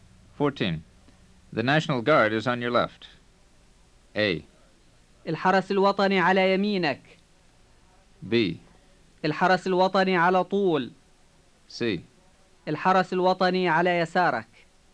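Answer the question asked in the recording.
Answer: C: الحرس الوطني على يسارك.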